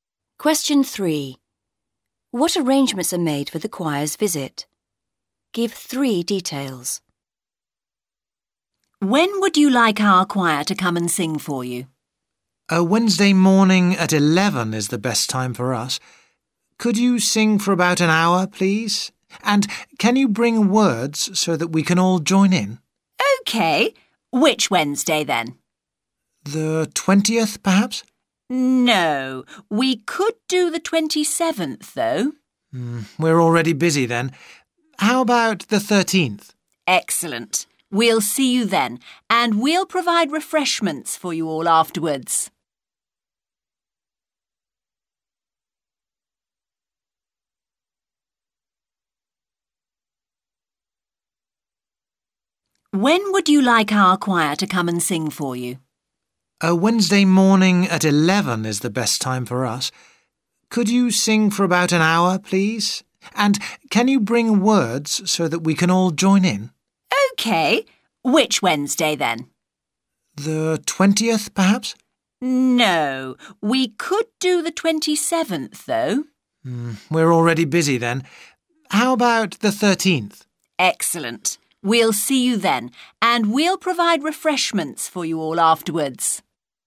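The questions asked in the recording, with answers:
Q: What arrangements are made for the choir's visit?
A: Wednesday the 13th at 11 a.m.; sing for about an hour; bring words so everyone can join in (refreshments provided afterwards)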